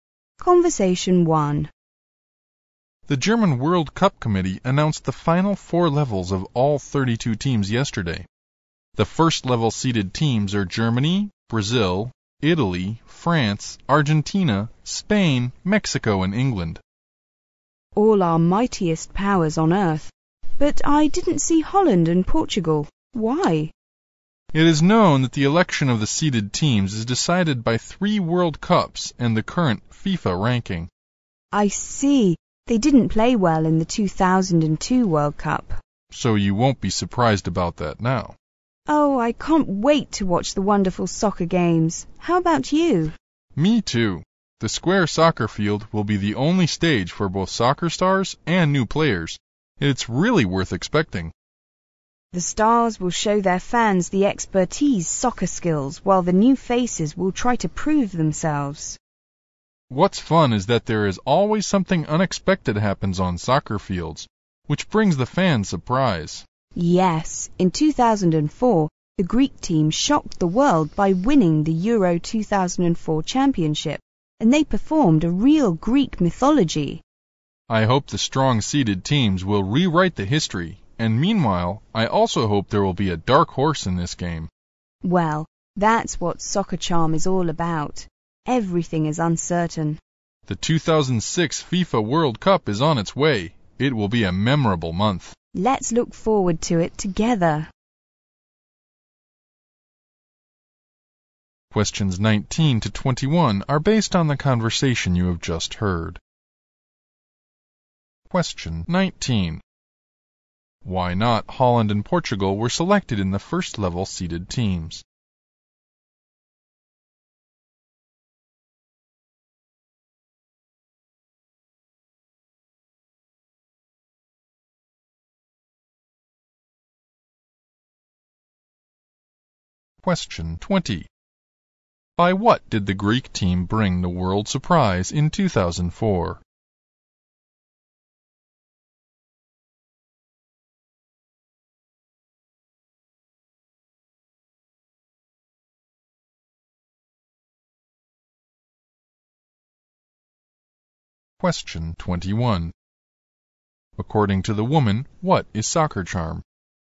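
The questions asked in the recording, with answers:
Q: Why not Holland and Portugal were selected in the first level seeded teams?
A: They didn't play well in the 2002 World Cup

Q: By what did the Greek team bring the world surprise in 2004?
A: By winning the Euro 2004 championship

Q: According to the woman, what is soccer charm?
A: Everything is uncertain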